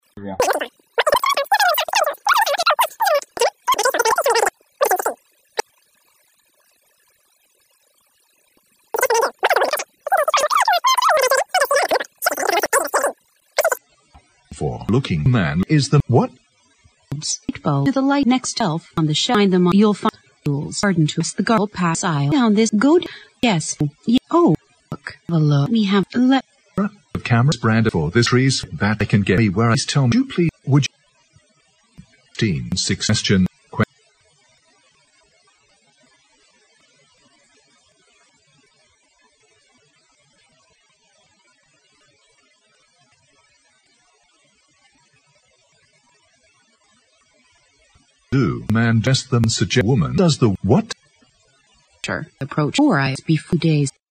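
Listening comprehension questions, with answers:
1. What does the woman suggest the man do?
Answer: Leave Daisy alone for the time being.

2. What is the man looking for?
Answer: Batteries.

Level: 六级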